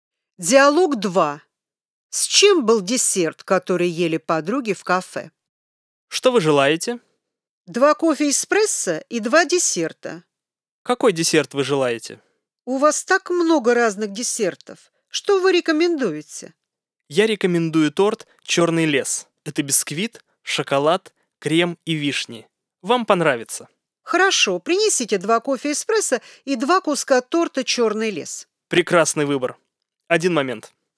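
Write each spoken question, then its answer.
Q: С чем был десерт, который ели подруги в кафе?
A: С шоколадом, кремом и вишнями (торт «Черный лес»)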